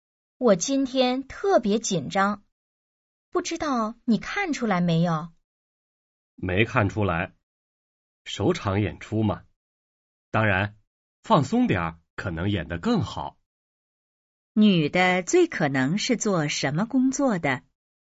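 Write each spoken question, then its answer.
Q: 女的最可能是做什么工作的?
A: 演员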